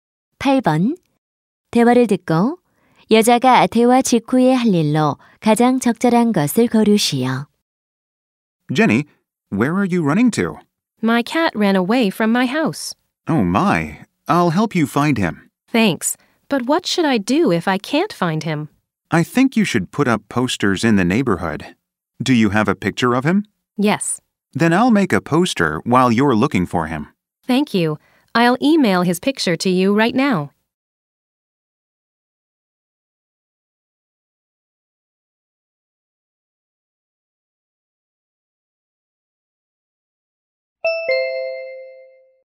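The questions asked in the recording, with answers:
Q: 대화를 듣고 여자가 대화 직후에 할 일로 가장 적절한 것을 고르시오.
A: 고양이 사진을 이메일로 보내기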